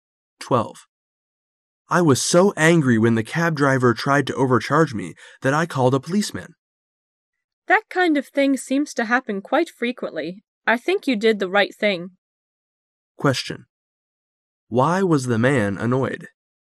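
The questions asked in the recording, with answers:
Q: Why was the man annoyed?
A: The cab driver tried to overcharge him

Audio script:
[解析] M :I was so angry when the cab driver tried to overcharge me that I called a policeman. W: That kind of thing seems to happen quite frequently. I think you did the right thing. Q: Why was the man annoyed?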